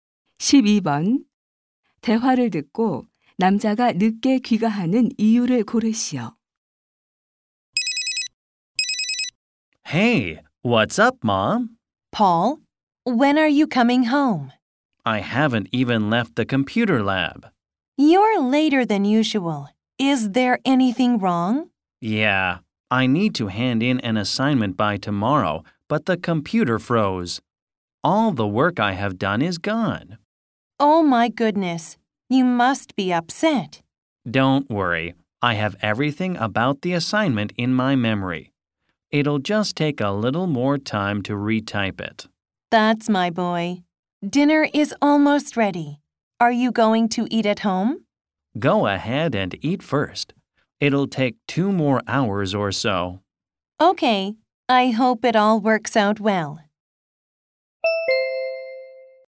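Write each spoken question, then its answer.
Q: 대화를 듣고 남자가 늦게 귀가하는 이유를 고르시오.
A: 컴퓨터가 멈춰 과제를 다시 입력해야 해서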